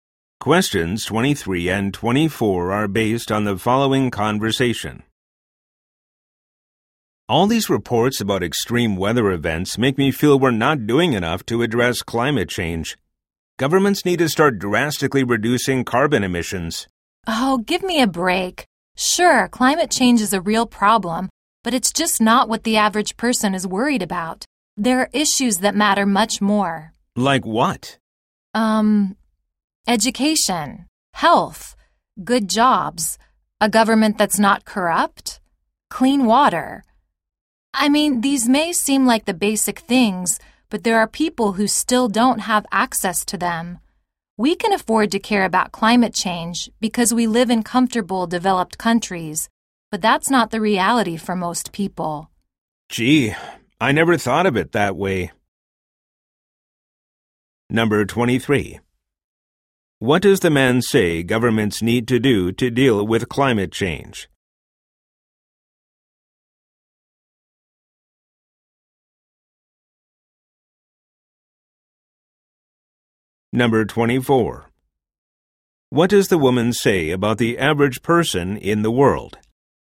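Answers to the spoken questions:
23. Drastically reduce carbon emissions
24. They worry more about basic issues than climate change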